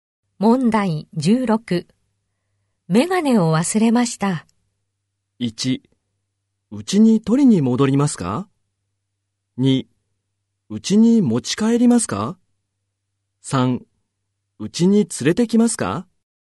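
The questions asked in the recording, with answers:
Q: メガネを忘れました。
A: 1: うちに取りに戻りますか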